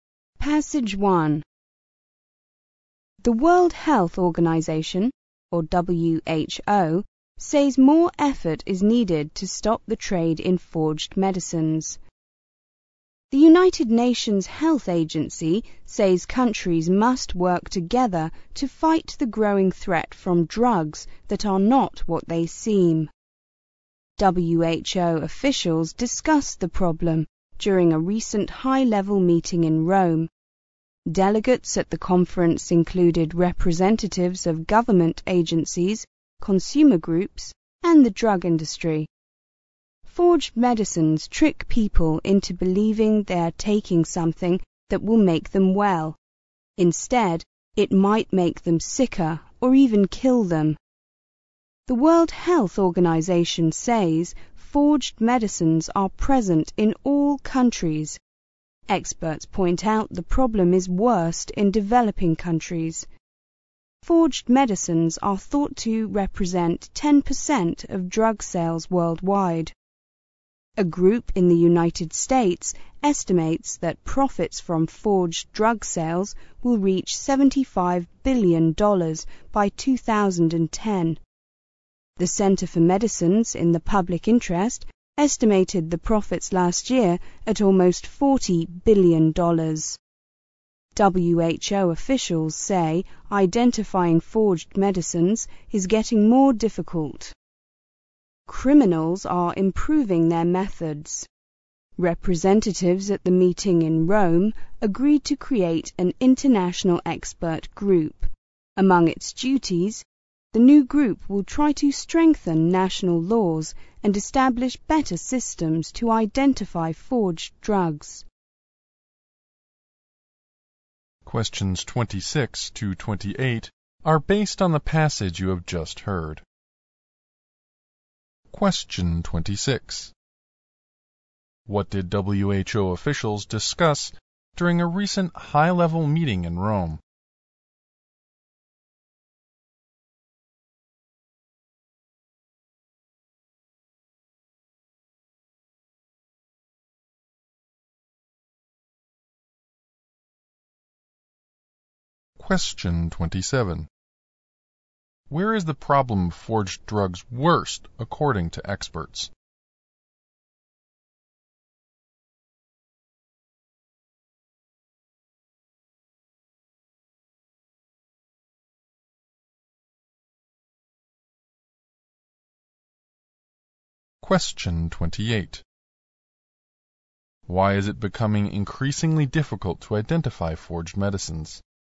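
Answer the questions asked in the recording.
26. The trade in forged medicines
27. In developing countries
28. Criminals are improving their methods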